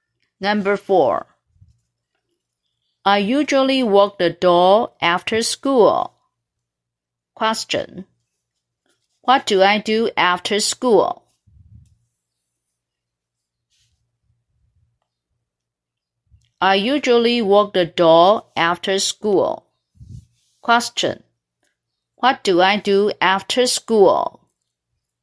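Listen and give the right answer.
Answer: walk the dog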